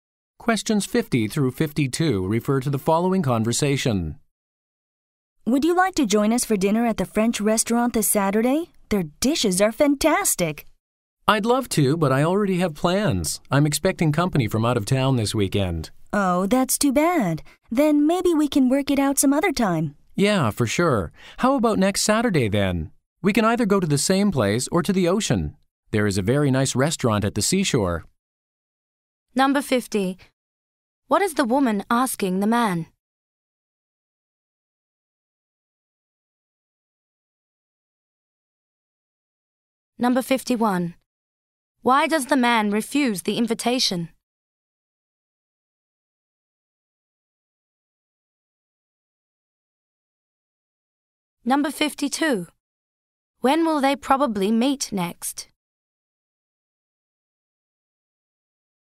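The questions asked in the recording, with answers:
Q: What is the woman asking the man?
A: To join them for dinner at a French restaurant on Saturday

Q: Why does the man refuse the invitation?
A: He is expecting guests from out of town

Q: When will they probably meet next?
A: Next Saturday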